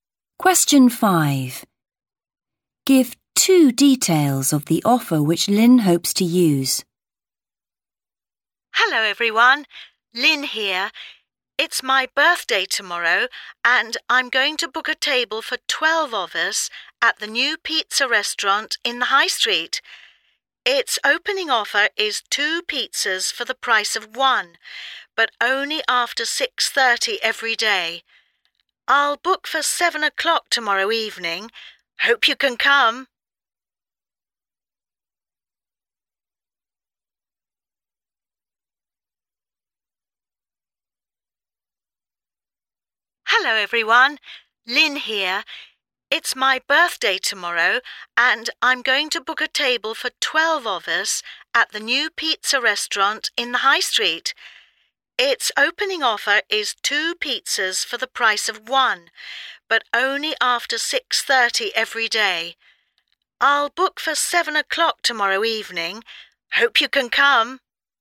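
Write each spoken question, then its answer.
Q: Give two details of the offer which Lynn hopes to use.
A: Two pizzas for the price of one, only after 6:30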